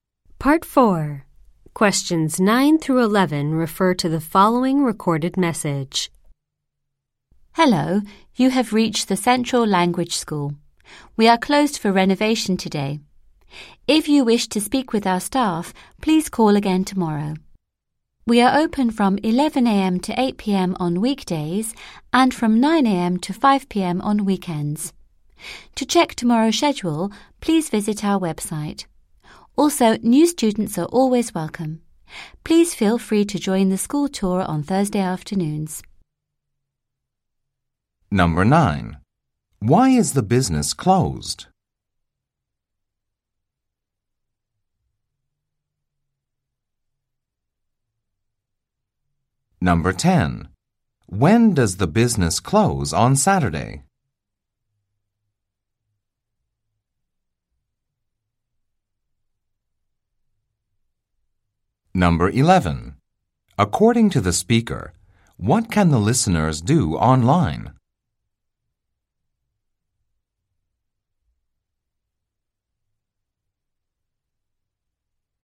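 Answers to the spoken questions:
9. It is being renovated.
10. At 5 p.m.
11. Check tomorrow's schedule.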